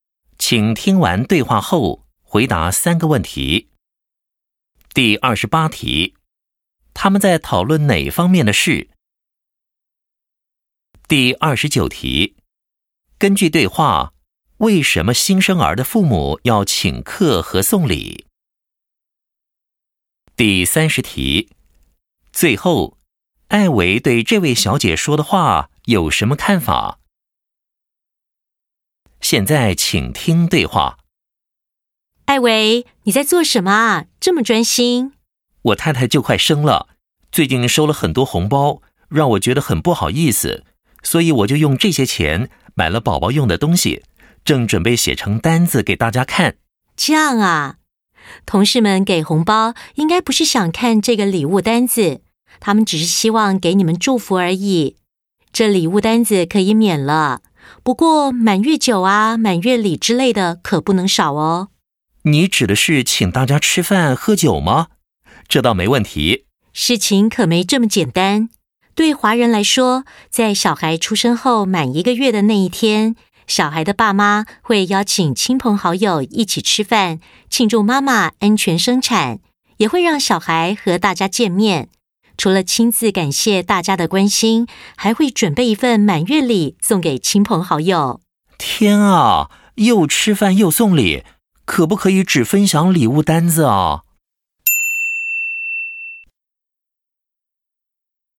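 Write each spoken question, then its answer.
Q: 他们在讨论哪方面的事?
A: 华人庆祝孩子出生(满月)的习俗

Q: 根据对话,为什么新生儿的父母要请客和送礼?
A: 庆祝妈妈安全生产、让孩子和大家见面,并感谢亲友的关心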